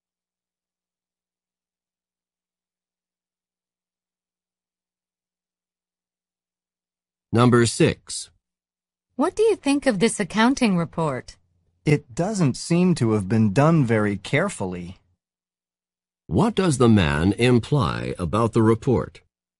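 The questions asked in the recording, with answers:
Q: What does the man imply about the report?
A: It was done carelessly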